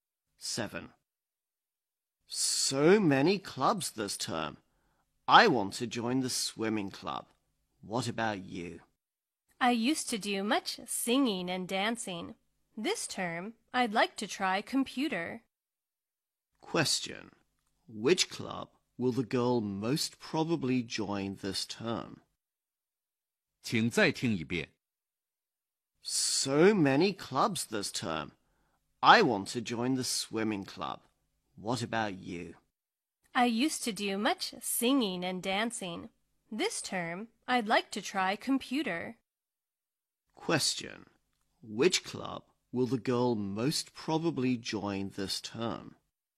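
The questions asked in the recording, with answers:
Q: Which club will the girl most probably join this term?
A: The computer club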